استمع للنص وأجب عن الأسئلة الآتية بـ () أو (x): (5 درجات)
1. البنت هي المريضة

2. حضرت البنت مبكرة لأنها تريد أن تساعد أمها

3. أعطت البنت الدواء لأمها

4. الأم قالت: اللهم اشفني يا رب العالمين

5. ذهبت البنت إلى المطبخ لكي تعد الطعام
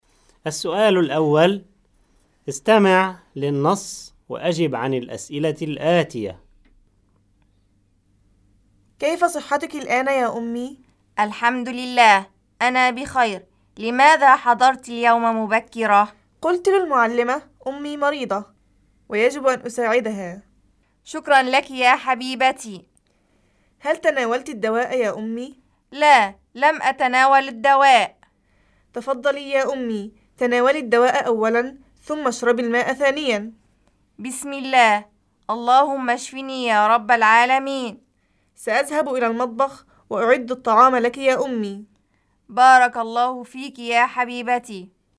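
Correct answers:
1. x
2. صح
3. صح
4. صح
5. صح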